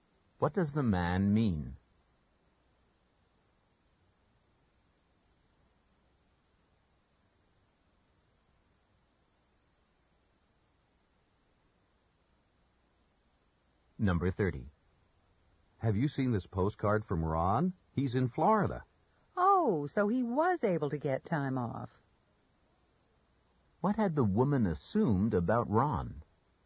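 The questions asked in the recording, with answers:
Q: What had the woman assumed about Ron?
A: That he couldn't get time off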